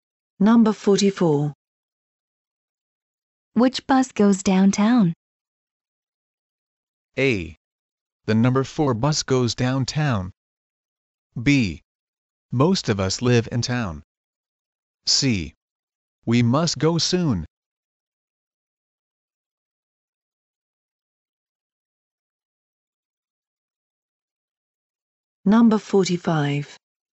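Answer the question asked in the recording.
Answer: A: The number 4 bus goes downtown.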